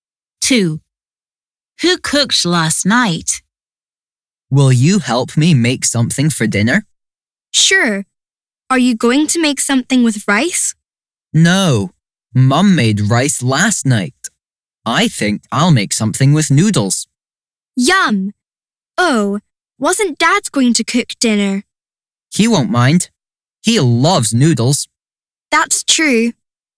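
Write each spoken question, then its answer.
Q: Who cooked last night?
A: Mum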